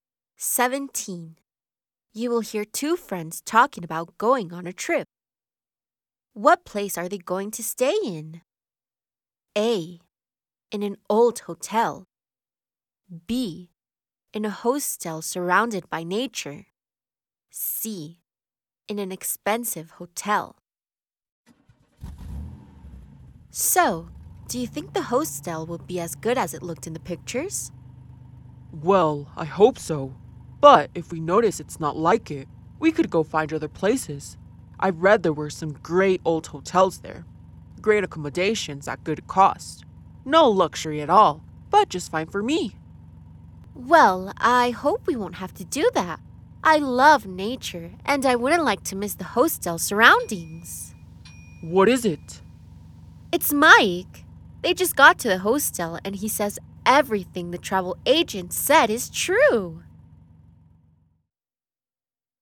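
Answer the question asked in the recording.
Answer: B: In a hostel surrounded by nature.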